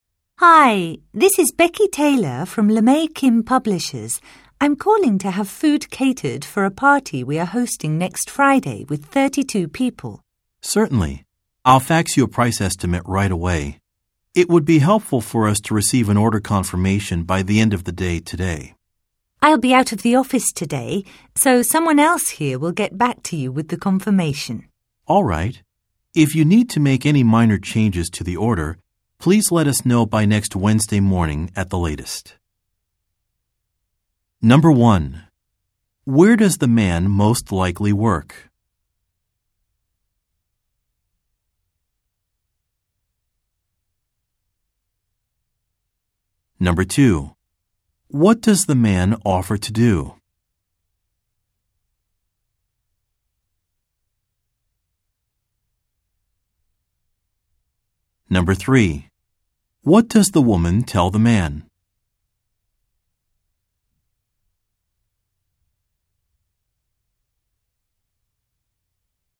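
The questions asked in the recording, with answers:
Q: Where does the man most likely work?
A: At a catering company

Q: What does the man offer to do?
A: Fax a price estimate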